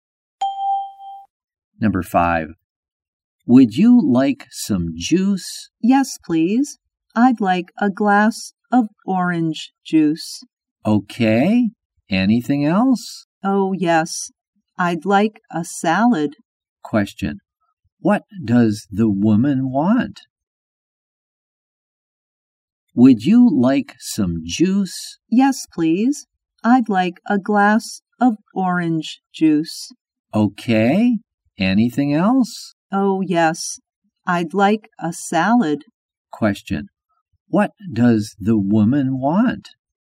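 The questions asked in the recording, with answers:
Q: What does the woman want?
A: A glass of orange juice and a salad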